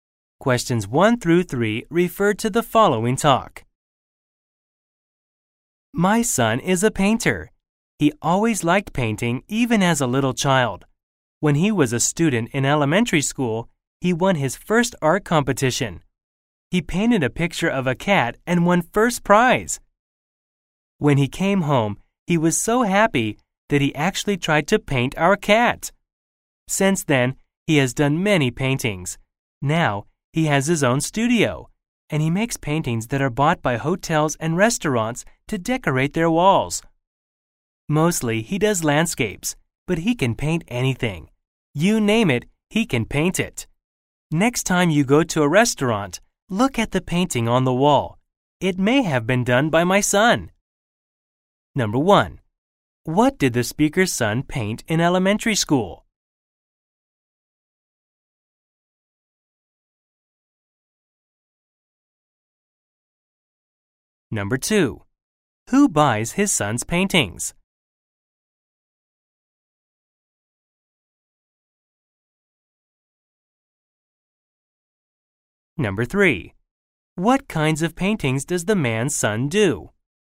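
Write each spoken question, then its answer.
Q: What did the speaker's son paint in elementary school?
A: A cat

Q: Who buys his son's paintings?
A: Hotels and restaurants

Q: What kinds of paintings does the man's son do?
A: Mostly landscapes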